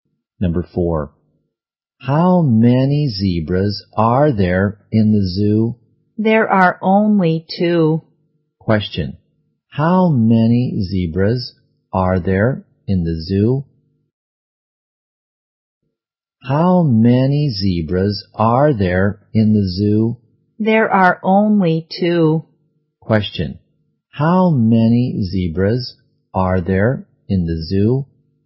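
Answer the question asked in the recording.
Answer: Two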